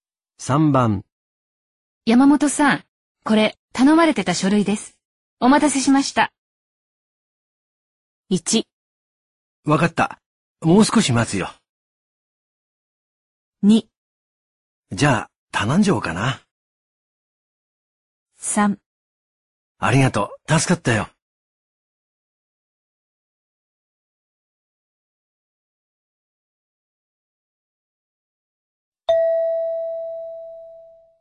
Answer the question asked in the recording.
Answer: 3

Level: N2